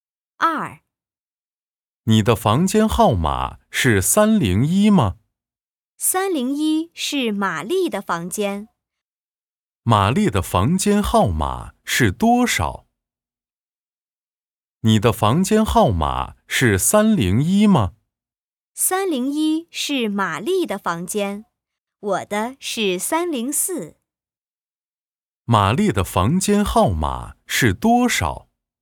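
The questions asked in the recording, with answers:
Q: 玛丽的房间号码是多少?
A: 301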